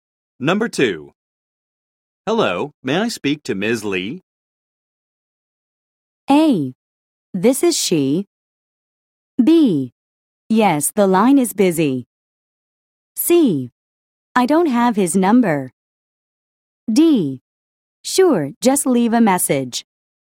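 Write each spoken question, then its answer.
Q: Hello, may I speak to Ms. Lee?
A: A: This is she.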